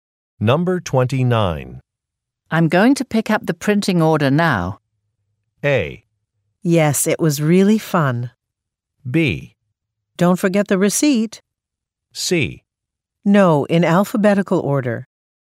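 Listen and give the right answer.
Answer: B: Don't forget the receipt.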